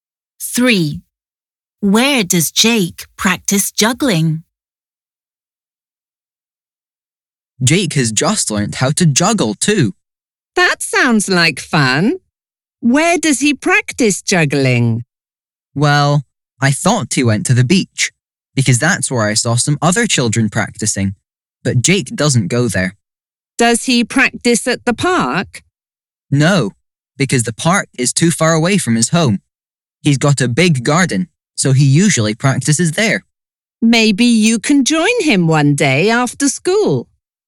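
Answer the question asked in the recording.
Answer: In his garden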